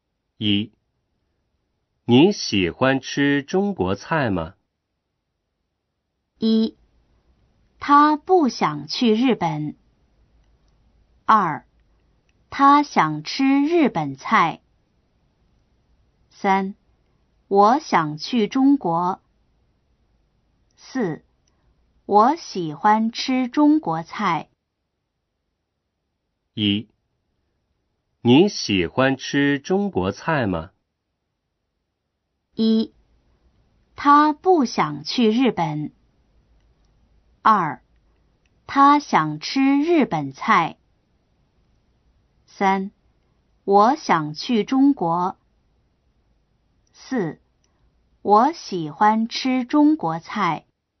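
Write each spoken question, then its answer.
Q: 你喜欢吃中国菜吗?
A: 4: 我喜欢吃中国菜。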